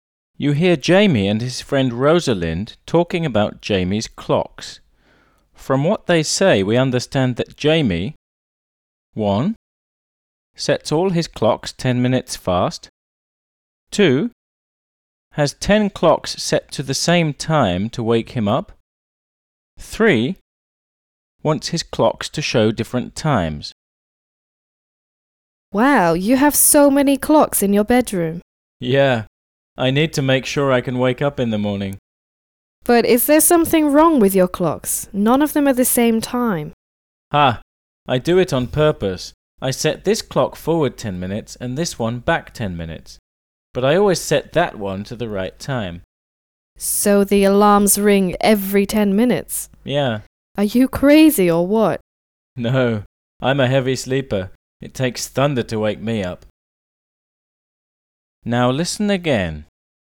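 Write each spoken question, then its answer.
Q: From what they say, we understand that Jamie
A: 3: Wants his clocks to show different times.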